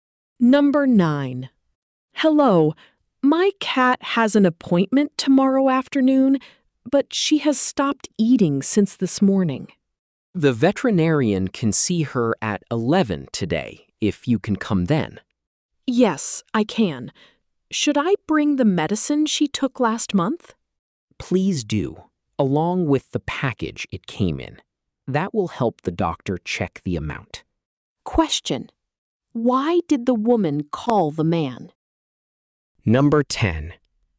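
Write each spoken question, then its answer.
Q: why did the woman call the man?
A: Her cat has stopped eating since this morning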